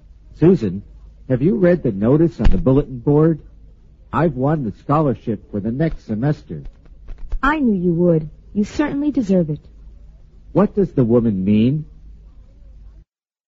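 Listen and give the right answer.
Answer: She expected the man to win the scholarship; he deserves it.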